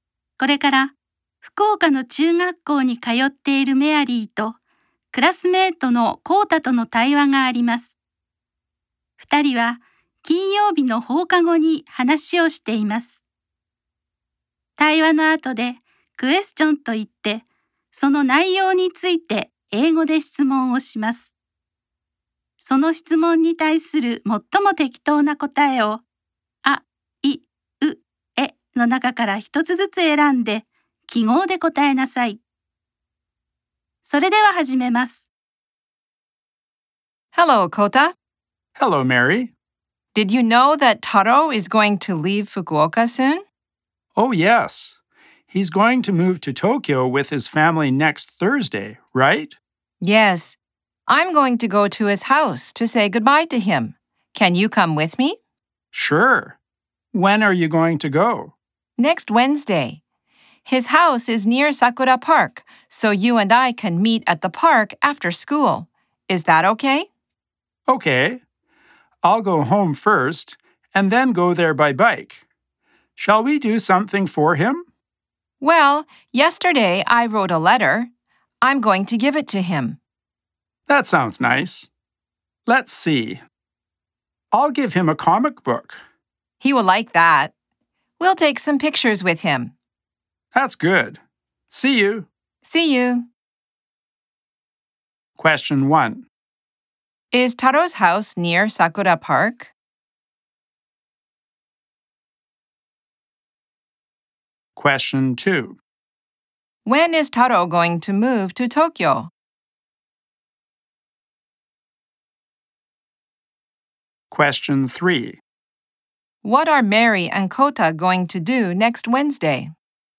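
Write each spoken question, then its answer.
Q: Is Taro's house near Sakura Park?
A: Yes, it is.

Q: When is Taro going to move to Tokyo?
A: Next Thursday.

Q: What are Mary and Kota going to do next Wednesday?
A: Visit Taro's house to say goodbye to him.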